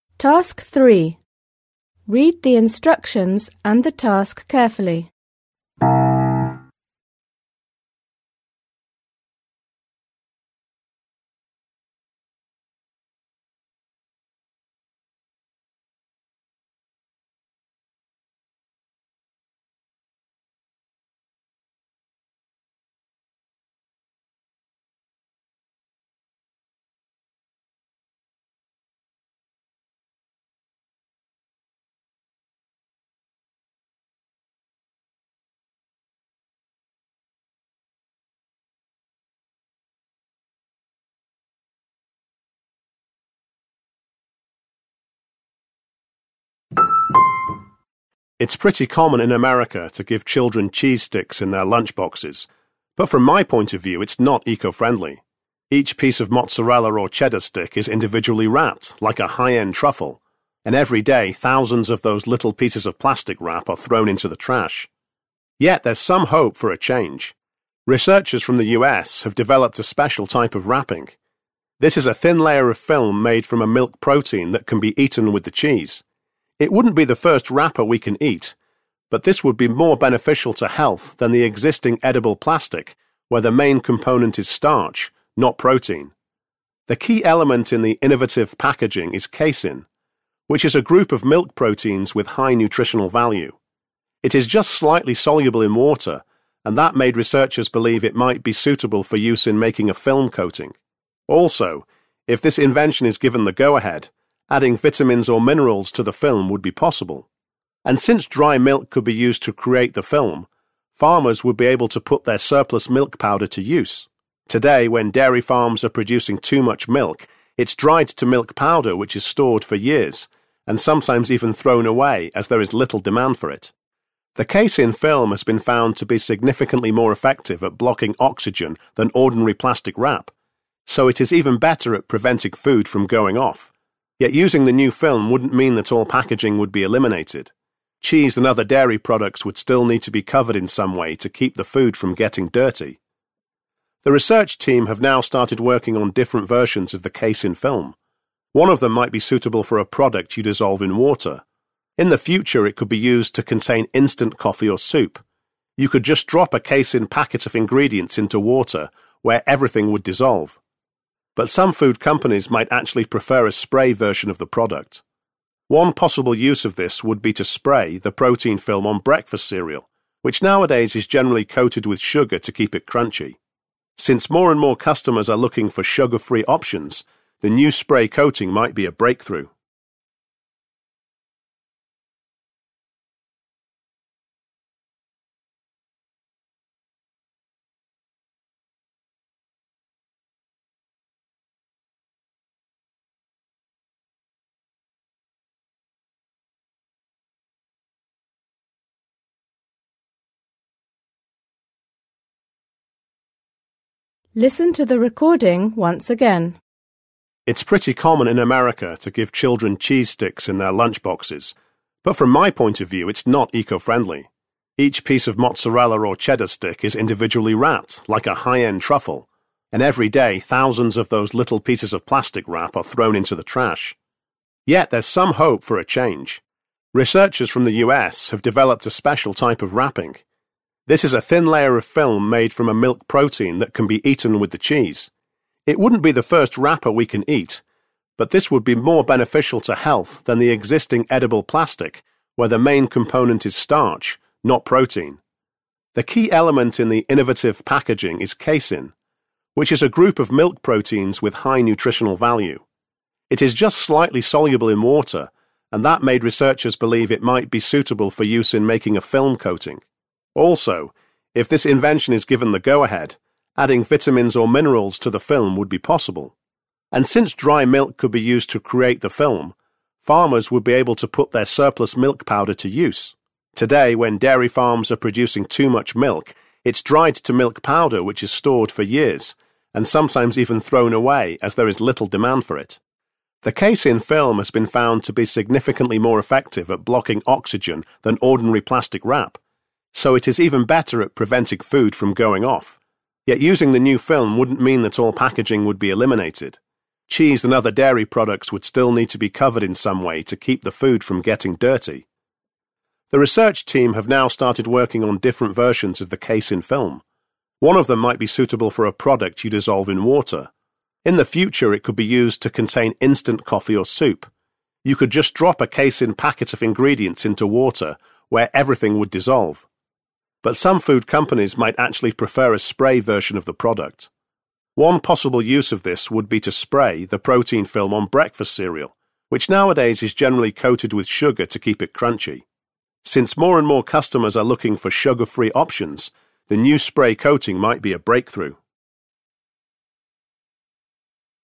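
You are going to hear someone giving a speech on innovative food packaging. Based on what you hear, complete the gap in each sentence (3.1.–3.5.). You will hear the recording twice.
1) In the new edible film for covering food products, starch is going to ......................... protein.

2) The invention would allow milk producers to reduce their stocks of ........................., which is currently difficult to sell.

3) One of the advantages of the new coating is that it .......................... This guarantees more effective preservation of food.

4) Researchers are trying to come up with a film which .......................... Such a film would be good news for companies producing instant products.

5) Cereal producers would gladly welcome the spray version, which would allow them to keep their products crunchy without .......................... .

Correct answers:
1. be replaced by
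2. milk powder
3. blocks oxygen better than plastic wrap
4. dissolves in water
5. coating them with sugar

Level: Poziom: dwujęzyczny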